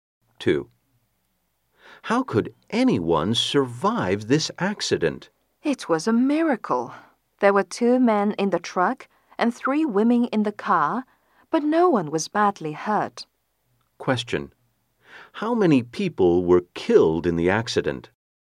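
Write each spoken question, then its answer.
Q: How many people were killed in the accident?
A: None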